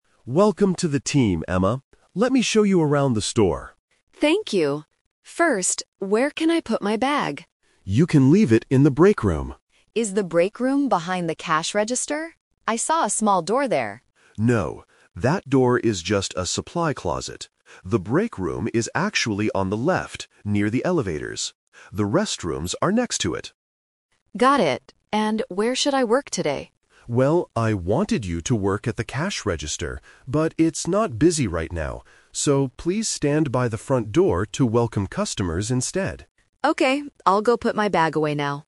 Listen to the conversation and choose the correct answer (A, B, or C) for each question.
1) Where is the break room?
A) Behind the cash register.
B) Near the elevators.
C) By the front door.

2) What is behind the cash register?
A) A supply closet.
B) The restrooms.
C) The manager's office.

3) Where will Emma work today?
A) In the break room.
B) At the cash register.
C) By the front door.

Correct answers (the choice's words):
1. Near the elevators.
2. A supply closet.
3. By the front door.

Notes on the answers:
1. The manager clearly says, "The break room is actually on the left, near the elevators." Why the trap is wrong: Option (A) is the trap. Emma asks if it is behind the cash register, but the manager says "No". Option (C) is where she will work later, not the break room.
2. When Emma asks about the door behind the cash register, the manager tells her "that door is just a supply closet." Why the trap is wrong: Option (B) is a trap because the restrooms are next to the break room, not behind the register. Option (C) is a plausible room in a store but it was never mentioned.
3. This is "The Twist". The manager changes his plan and says, "please stand by the front door to welcome customers instead." Why the trap is wrong: Option (B) is the trap. The manager wanted her at the cash register first, but the store wasn't busy. Option (A) is where she puts her bag, not where she works.

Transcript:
Manager: Welcome to the team, Emma. Let me show you around the store.
Emma: Thank you! First, where can I put my bag?
Manager: You can leave it in the break room.
Emma: Is the break room behind the cash register? I saw a small door there.
Manager: No, that door is just a supply closet. The break room is actually on the left, near the elevators. The restrooms are next to it.
Emma: Got it. And where should I work today?
Manager: Well, I wanted you to work at the cash register, but it's not busy right now. So, please stand by the front door to welcome customers instead.